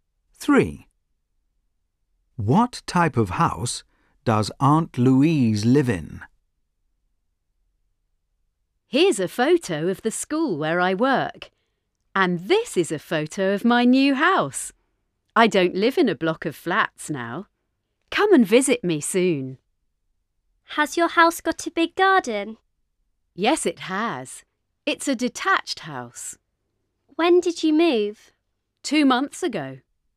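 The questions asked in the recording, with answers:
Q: What type of house does Aunt Louise live in?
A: a detached house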